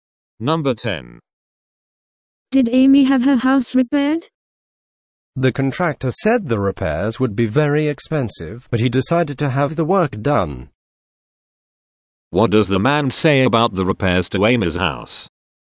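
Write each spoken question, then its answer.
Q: What does the man say about the repairs to Amy's house?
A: They were expensive, but the work was done anyway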